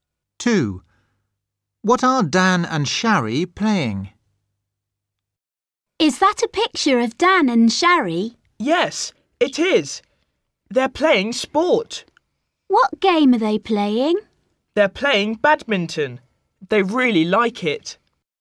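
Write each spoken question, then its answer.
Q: What are Dan and Shari playing?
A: badminton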